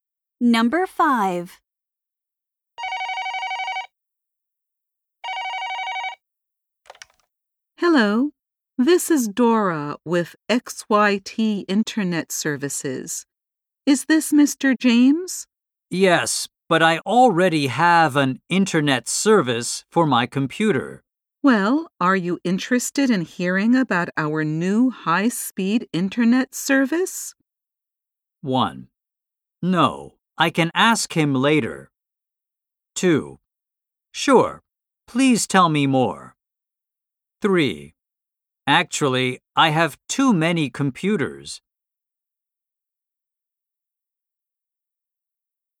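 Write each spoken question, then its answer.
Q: Well, are you interested in hearing about our new high-speed internet service?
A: 2: Sure, please tell me more.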